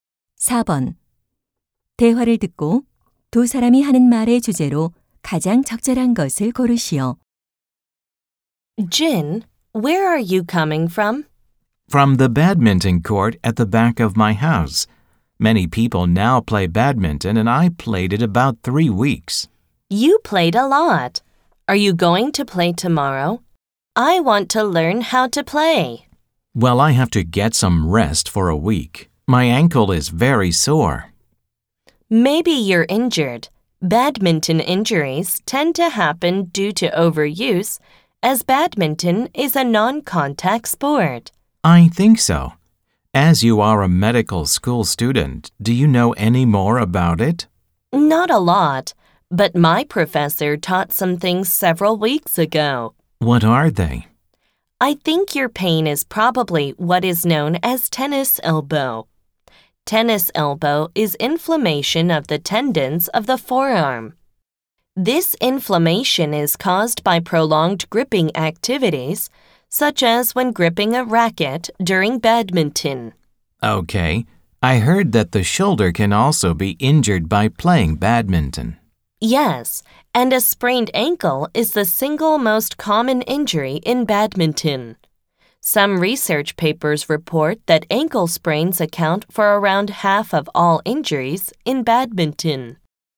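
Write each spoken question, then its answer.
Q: 대화를 듣고 두 사람이 하는 말의 주제로 가장 적절한 것을 고르시오.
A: 배드민턴으로 인한 부상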